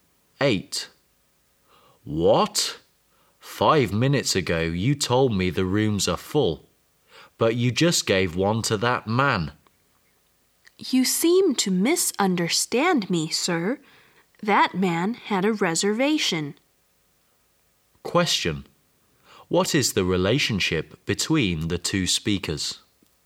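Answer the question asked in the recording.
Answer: Hotel clerk and guest.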